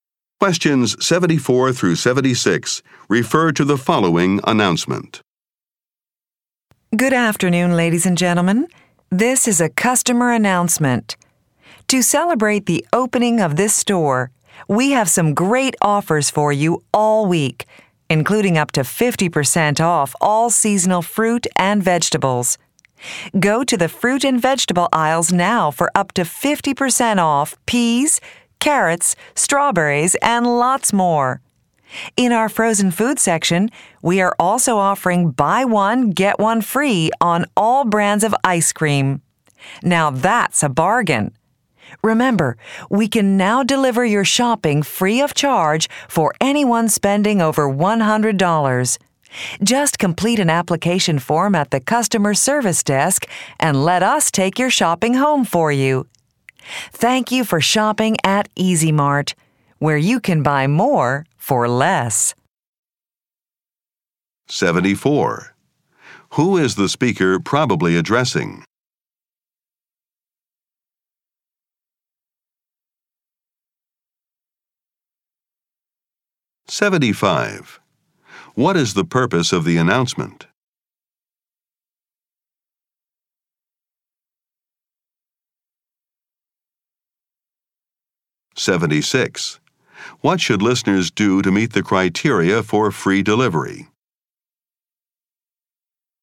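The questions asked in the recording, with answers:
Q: Who is the speaker probably addressing?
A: Shoppers in a store

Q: What is the purpose of the announcement?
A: To tell customers about special offers for the store opening

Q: What should listeners do to meet the criteria for free delivery?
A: Spend over $100 and fill in a form at the customer service desk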